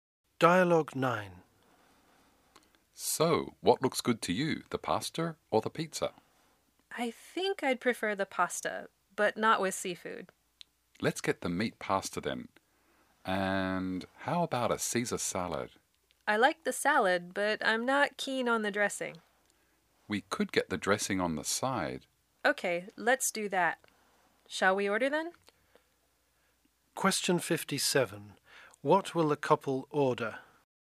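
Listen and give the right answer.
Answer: Meat pasta and a Caesar salad with the dressing on the side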